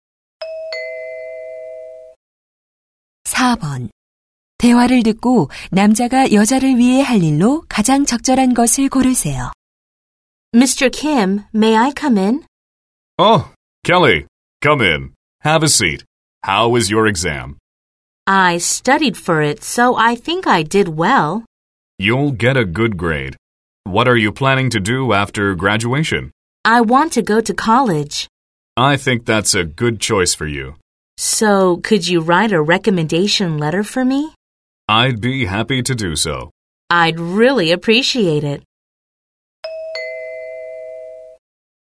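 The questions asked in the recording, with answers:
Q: 대화를 듣고 남자가 여자를 위해 할 일로 가장 적절한 것을 고르세요.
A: 추천서 써 주기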